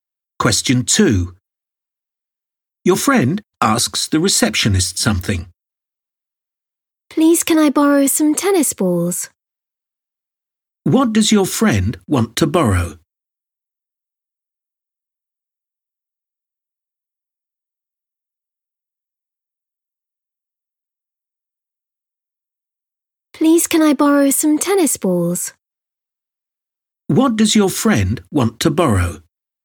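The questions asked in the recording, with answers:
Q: What does your friend want to borrow?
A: some tennis balls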